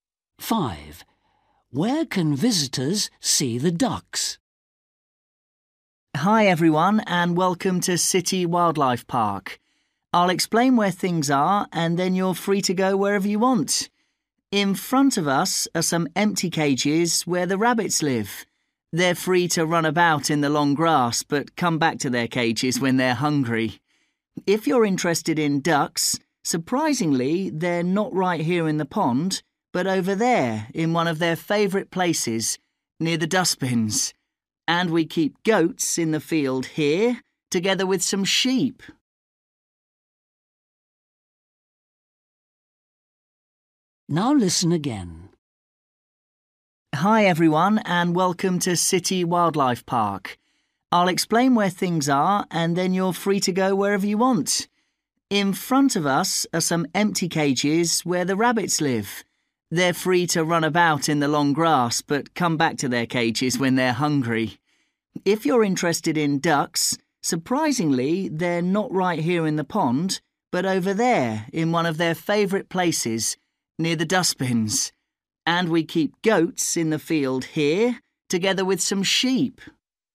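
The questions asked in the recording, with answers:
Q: Where can visitors see the ducks?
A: near the dustbins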